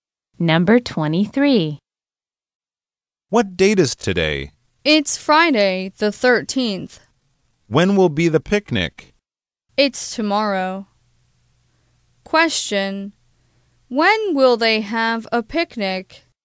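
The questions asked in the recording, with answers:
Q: When will they have a picnic?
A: Tomorrow, Saturday the 14th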